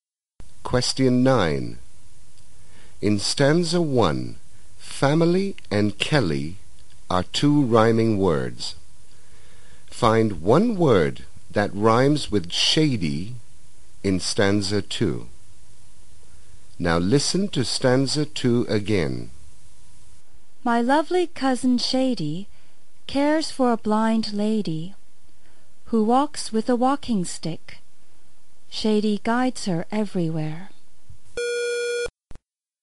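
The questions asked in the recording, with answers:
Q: Find one word that rhymes with shady in stanza 2.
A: lady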